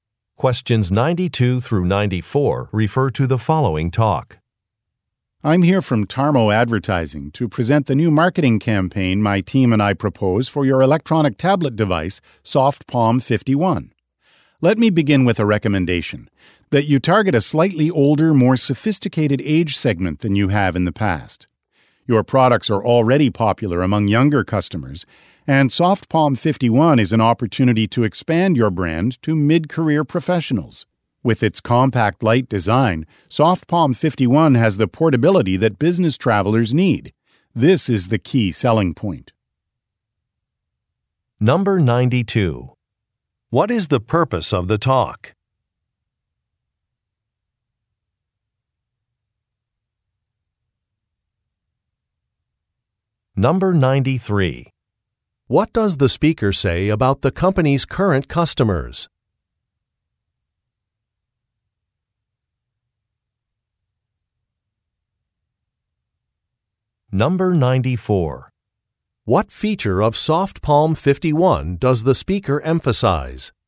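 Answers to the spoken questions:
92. To present a new marketing campaign
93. They are mostly younger people
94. Its portability (compact, light design)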